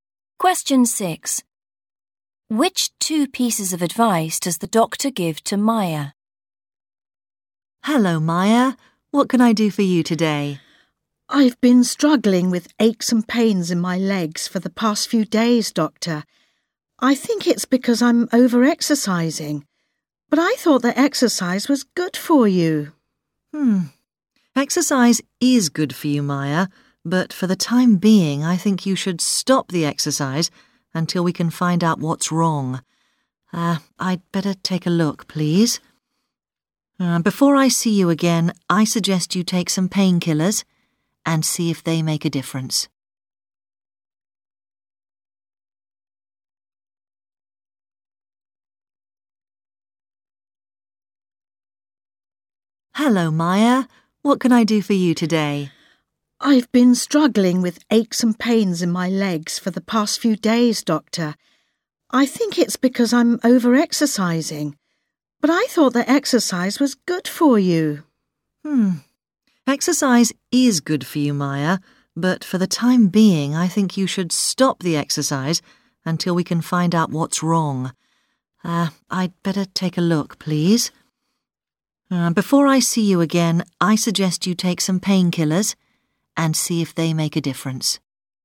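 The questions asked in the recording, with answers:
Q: Which 2 pieces of advice does the doctor give to Maya?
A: Stop exercising and take painkillers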